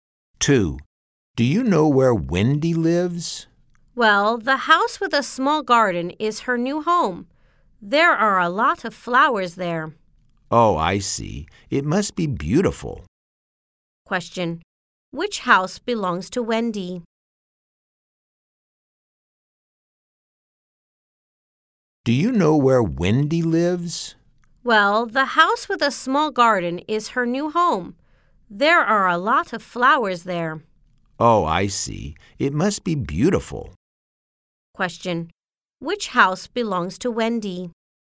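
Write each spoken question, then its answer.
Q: Question, which house belongs to Wendy?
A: The house with a small garden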